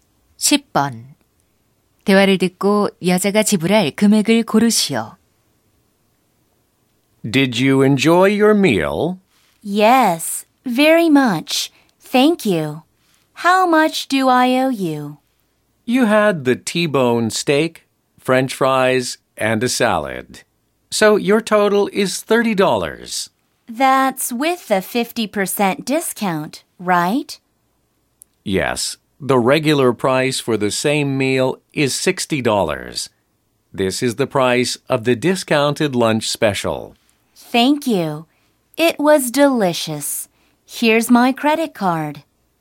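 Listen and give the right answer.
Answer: 30달러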